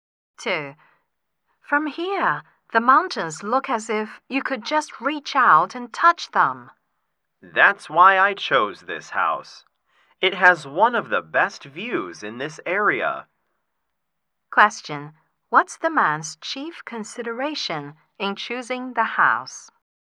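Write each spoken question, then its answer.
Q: What's the man's chief consideration in choosing the house?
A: The view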